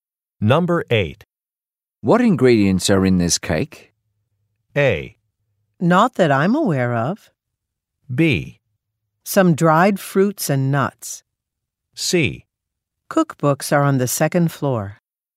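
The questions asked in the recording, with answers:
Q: What ingredients are in this cake?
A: B: Some dried fruits and nuts.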